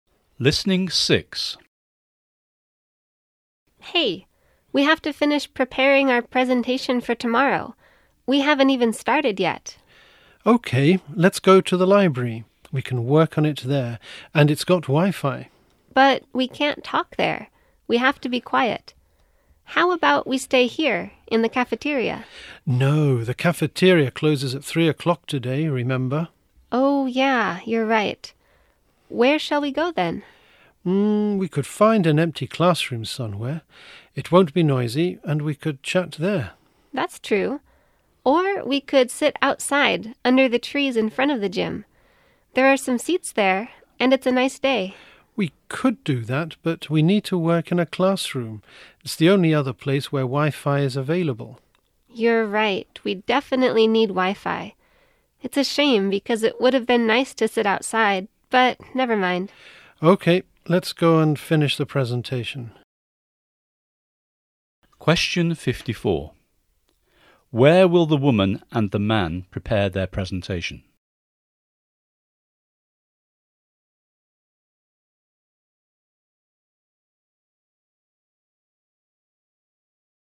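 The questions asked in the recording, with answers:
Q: Where will the woman and the man prepare their presentation?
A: In an empty classroom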